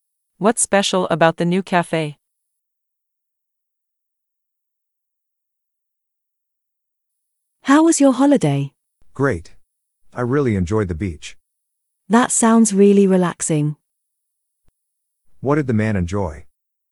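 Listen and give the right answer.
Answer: the beach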